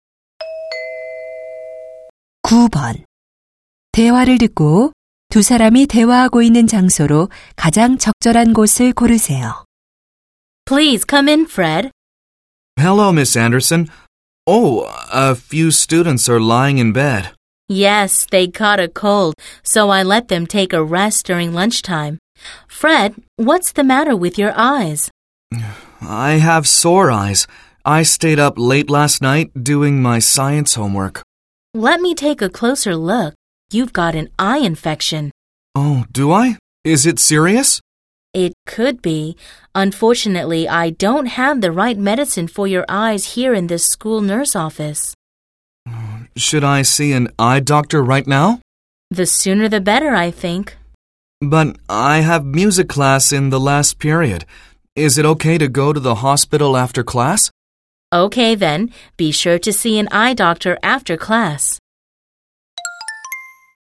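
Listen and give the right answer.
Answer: 학교 보건실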